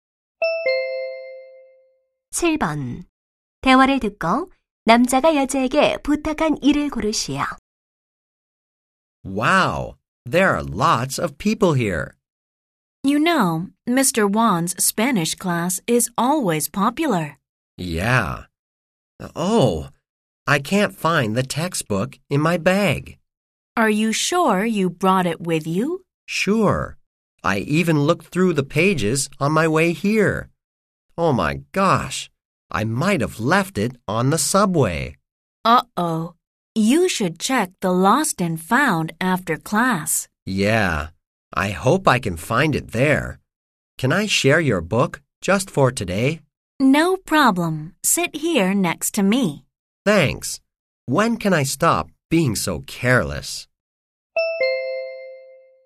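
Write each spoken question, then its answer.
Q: 대화를 듣고 남자가 여자에게 부탁한 일을 고르시오.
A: 교과서 같이 보기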